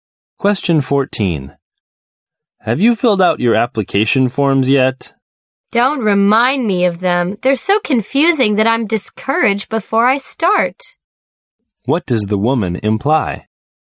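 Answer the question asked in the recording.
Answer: She hasn't filled out the forms because they are too confusing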